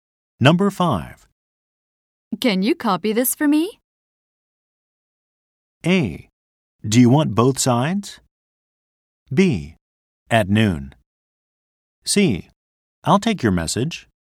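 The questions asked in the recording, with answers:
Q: Can you copy this for me?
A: A: Do you want both sides?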